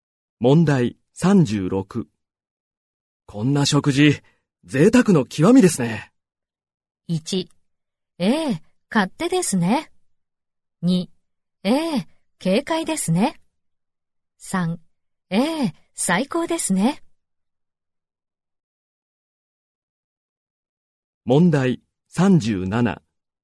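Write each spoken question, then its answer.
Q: こんな食事、贅沢の極みですね。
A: 3: ええ、最高ですね。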